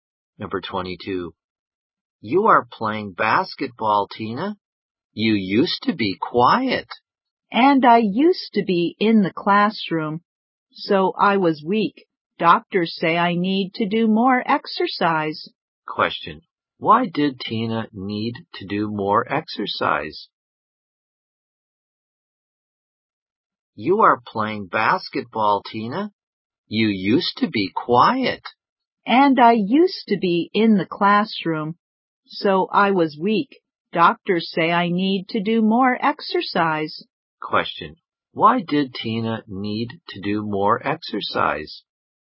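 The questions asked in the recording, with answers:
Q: Why did Tina need to do more exercise?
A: Because she was weak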